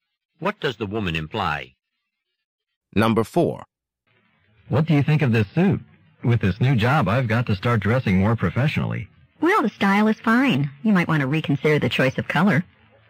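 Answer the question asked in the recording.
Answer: The man should choose a suit in a different color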